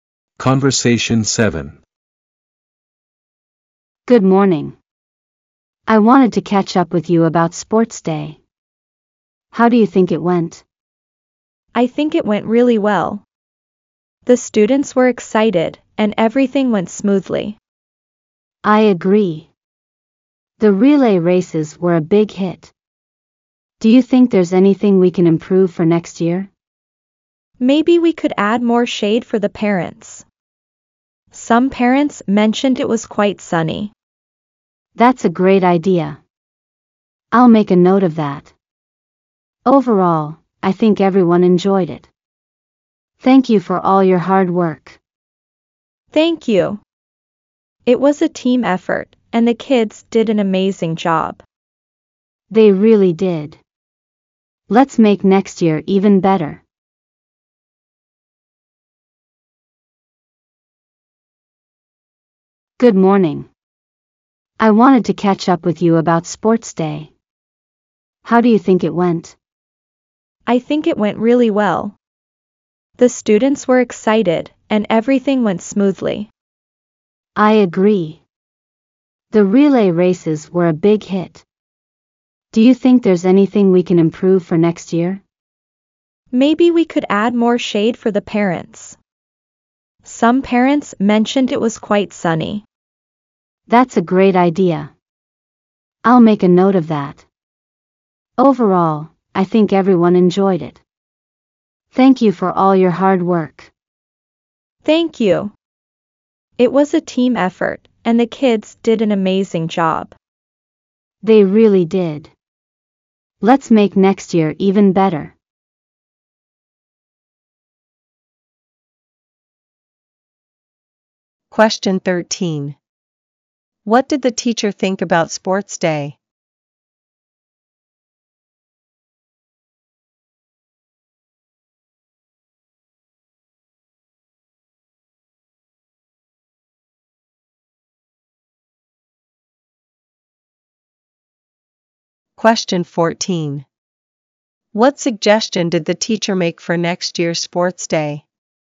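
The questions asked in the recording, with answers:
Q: What did the teacher think about sports day?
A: It went really well

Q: What suggestion did the teacher make for next year's sports day?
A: Add more shade for the parents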